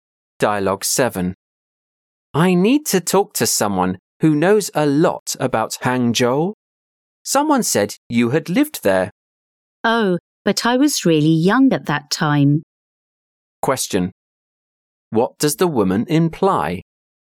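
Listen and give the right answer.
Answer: She doesn't know much about Hangzhou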